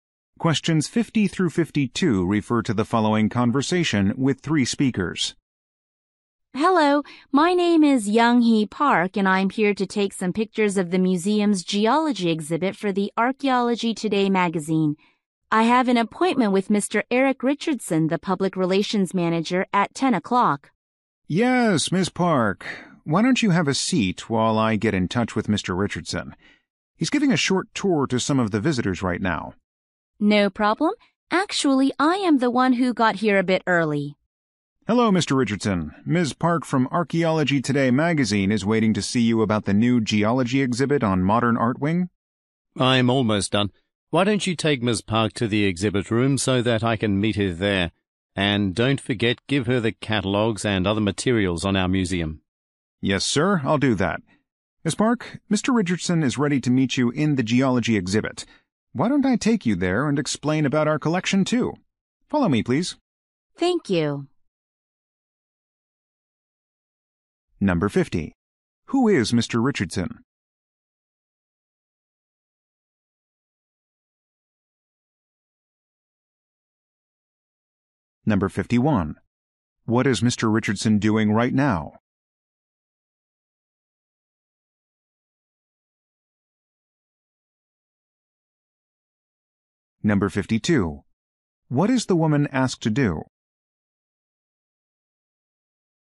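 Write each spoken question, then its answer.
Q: Who is Mr. Richardson?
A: The museum's public relations manager

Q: What is Mr. Richardson doing right now?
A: Giving a tour to visitors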